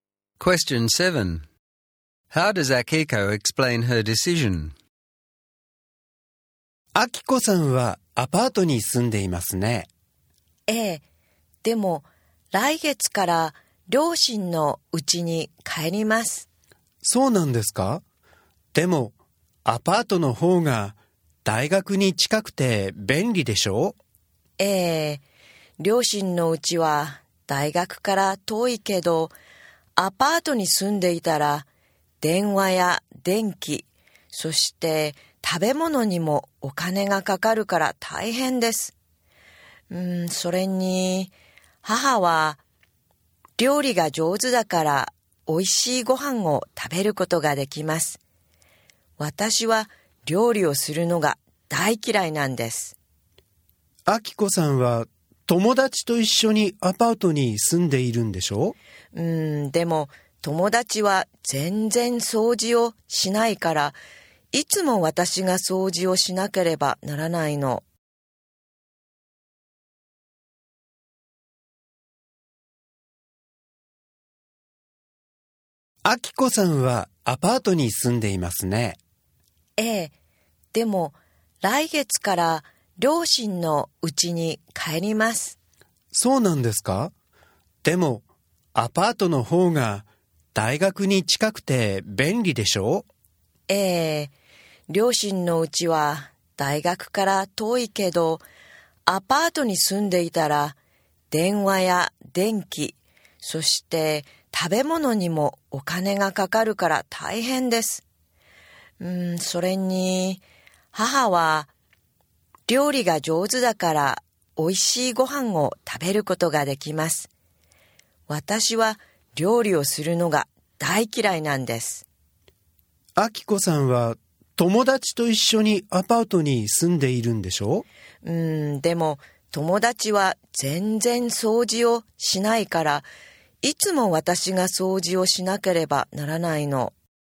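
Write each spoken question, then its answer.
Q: How does Akiko explain her decision?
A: Living in the apartment is expensive, her mother cooks well and she hates cooking, and her flatmate never cleans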